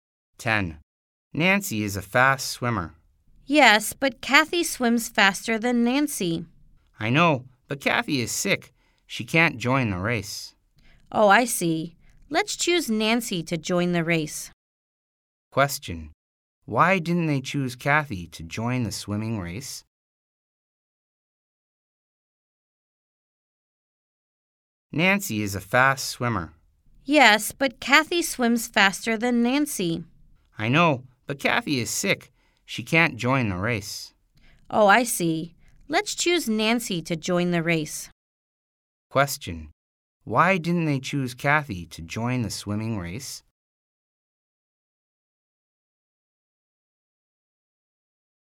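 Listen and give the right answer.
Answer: Because Kathy is sick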